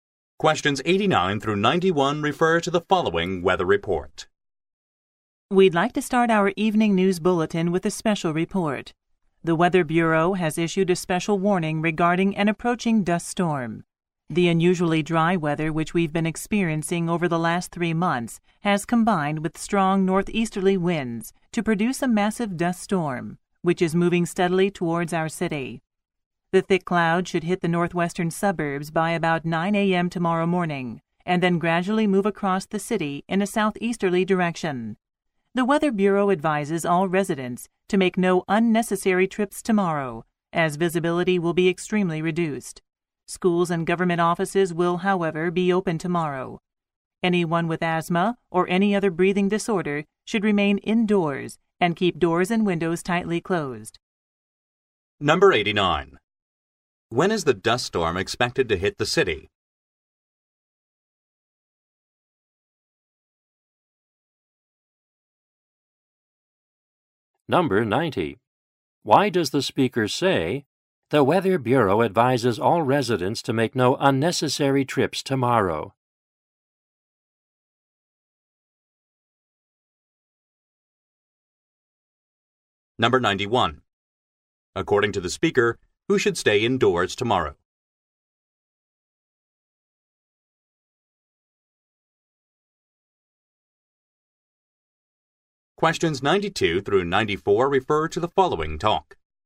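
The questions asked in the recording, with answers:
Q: When is the dust storm expected to hit the city?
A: About 9 a.m. tomorrow

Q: Why does the speaker say, "The Weather Bureau advises all residents to make no unnecessary trips tomorrow"?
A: Because visibility will be extremely reduced

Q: According to the speaker, who should stay indoors tomorrow?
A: People with asthma or other breathing disorders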